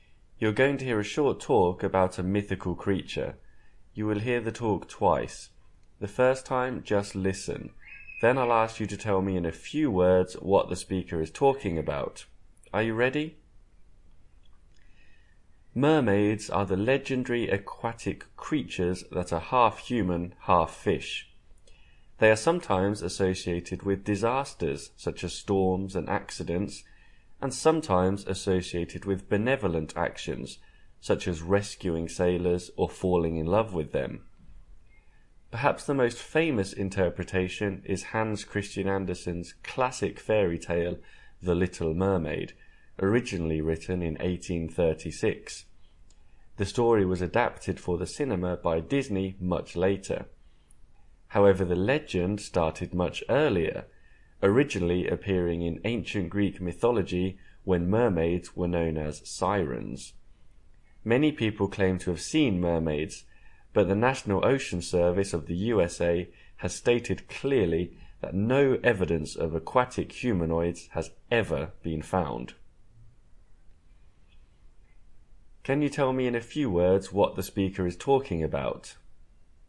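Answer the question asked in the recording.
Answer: Mermaids, legendary creatures that are half human and half fish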